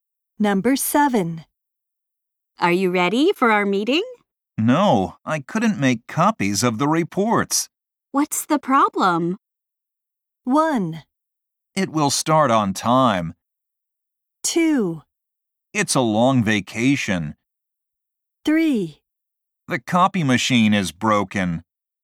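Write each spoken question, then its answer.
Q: What's the problem?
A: 3: The copy machine is broken.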